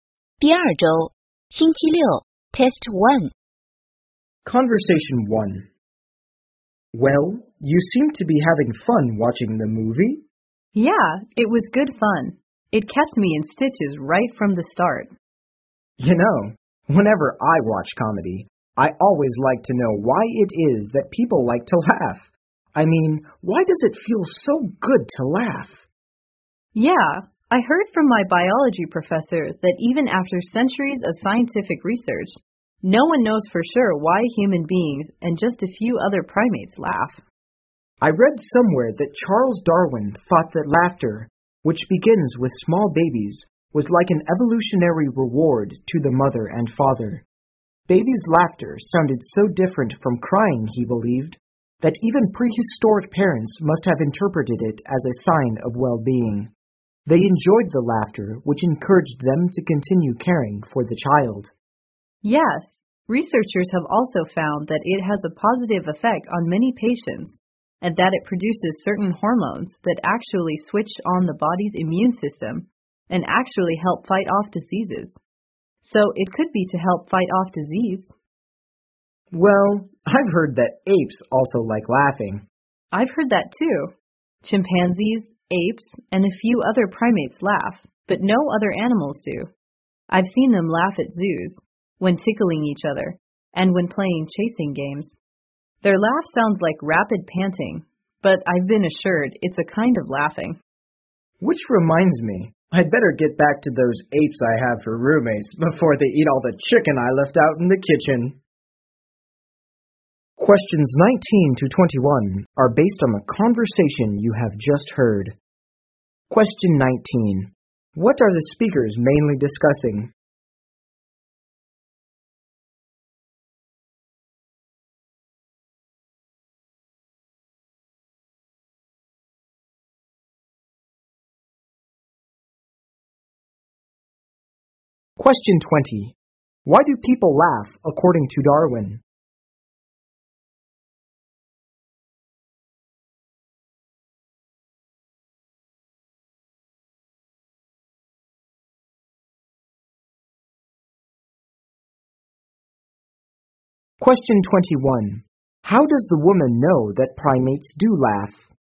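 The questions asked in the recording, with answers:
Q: What are the speakers mainly discussing?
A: Why people laugh

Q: Why do people laugh according to Darwin?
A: Babies' laughter is an evolutionary reward that encourages parents to keep caring for the child

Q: How does the woman know that primates do laugh?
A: She has seen them laugh at zoos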